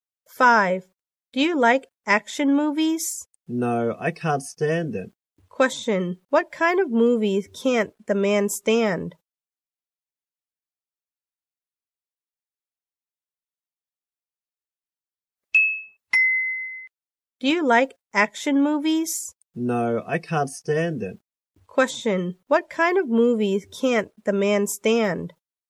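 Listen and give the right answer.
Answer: Action movies.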